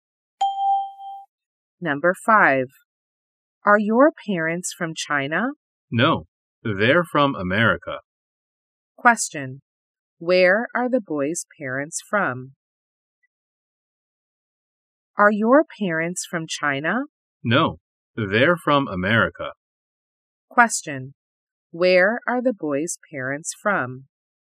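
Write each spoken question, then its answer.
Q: Where are the boy's parents from?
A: America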